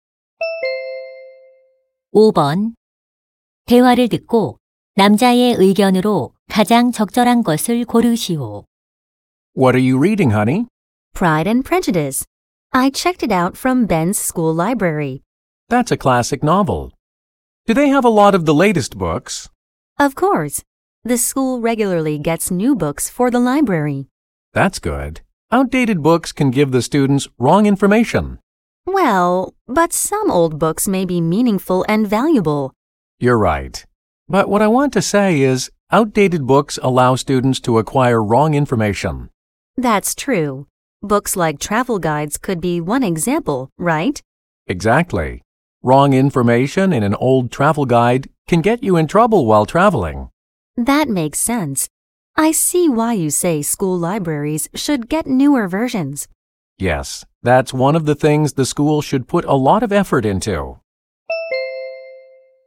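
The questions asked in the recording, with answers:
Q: 대화를 듣고 남자의 의견으로 가장 적절한 것을 고르시오.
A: 학교 도서관은 최신 도서를 갖추어야 한다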